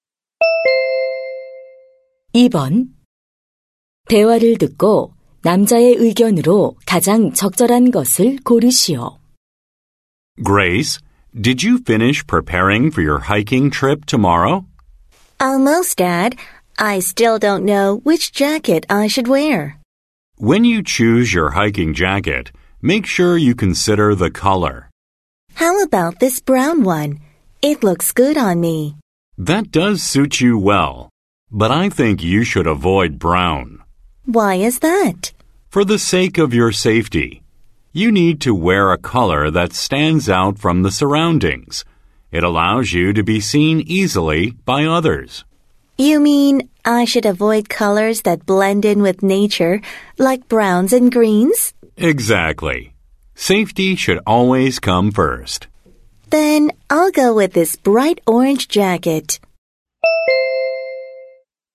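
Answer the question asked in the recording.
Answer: 등산할 때는 안전을 위해 눈에 잘 띄는 색의 옷을 입어야 한다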